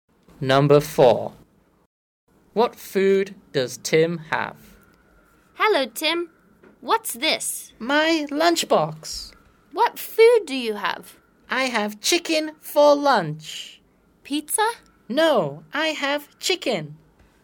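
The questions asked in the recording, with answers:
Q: What food does Tim have?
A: chicken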